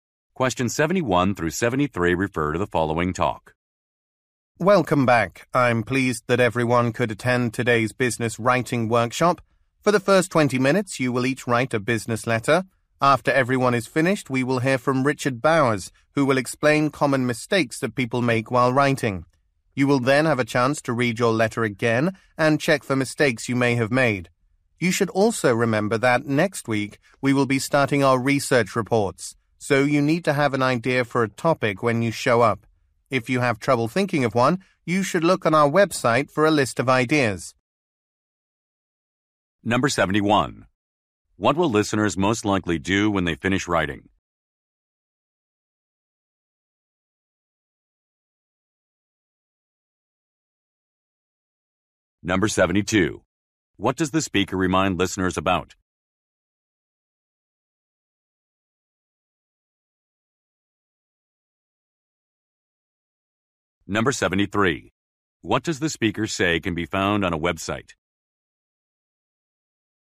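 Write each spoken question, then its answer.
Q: What will listeners most likely do when they finish writing?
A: Listen to Richard Bowers explain common writing mistakes

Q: What does the speaker remind listeners about?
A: To have a research report topic idea for next week

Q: What does the speaker say can be found on a website?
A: A list of topic ideas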